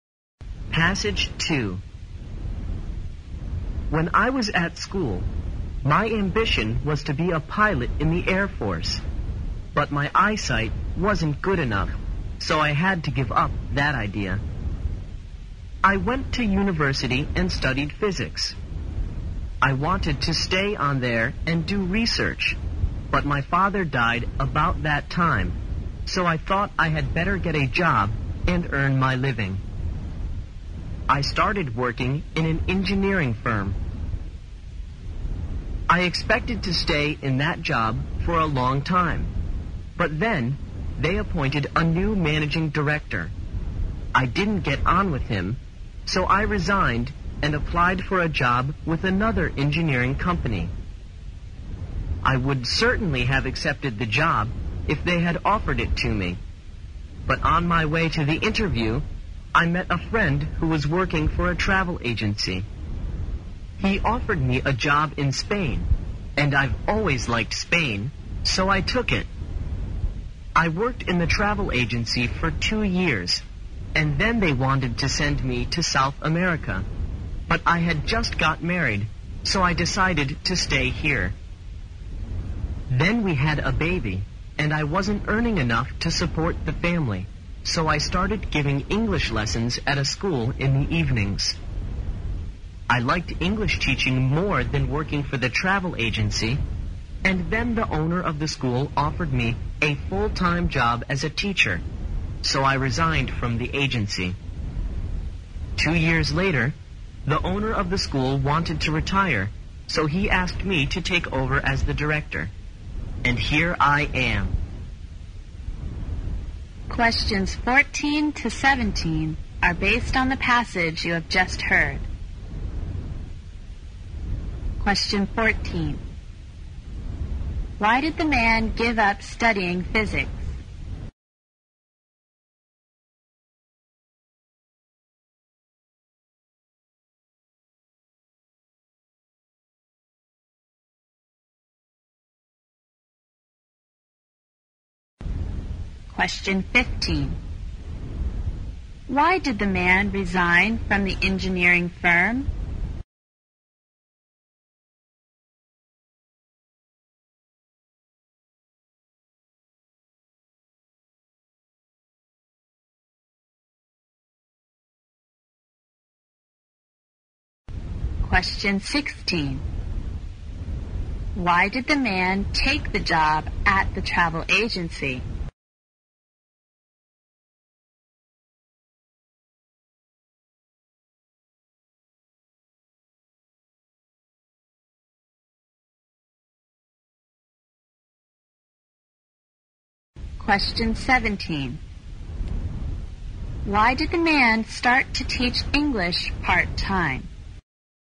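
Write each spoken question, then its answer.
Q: Why did the man give up studying physics?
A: His father died, so he had to earn a living

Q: Why did the man resign from the engineering firm?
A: He didn't get on with the new managing director

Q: Why did the man take the job at the travel agency?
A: It was a job in Spain, and he had always liked Spain

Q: Why did the man start to teach English part-time?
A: He wasn't earning enough to support his family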